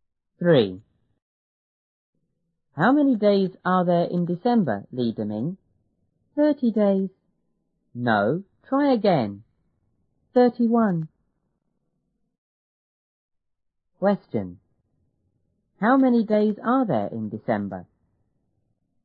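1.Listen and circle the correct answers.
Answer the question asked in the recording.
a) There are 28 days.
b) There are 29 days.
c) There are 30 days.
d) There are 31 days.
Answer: d) There are 31 days.

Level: 初中英语广州版1B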